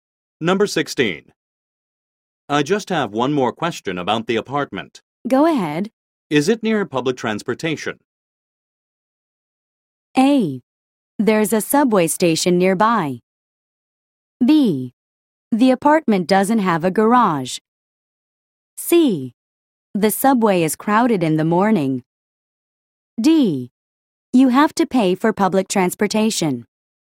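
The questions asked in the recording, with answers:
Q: Is it near public transportation?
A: A: There's a subway station nearby.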